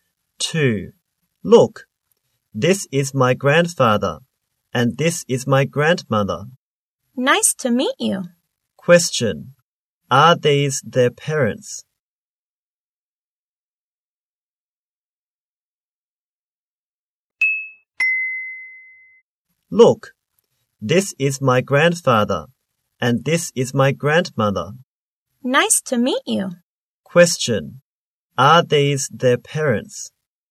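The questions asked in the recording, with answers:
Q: Are these their parents?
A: No, they are grandparents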